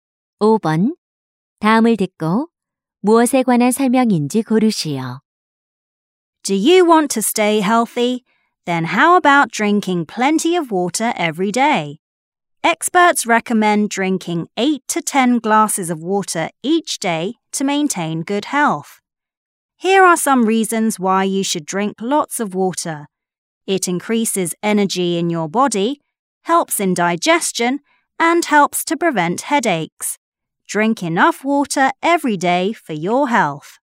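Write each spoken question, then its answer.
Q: 다음을 듣고 무엇에 관한 설명인지 고르시오.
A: 물을 충분히 마시는 것의 이점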